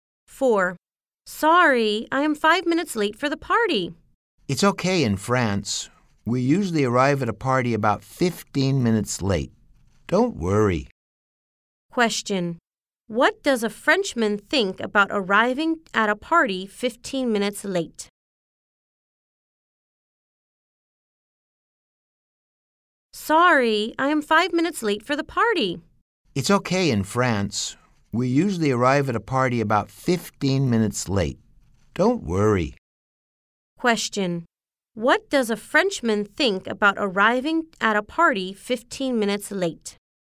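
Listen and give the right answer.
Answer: It's okay; it's usual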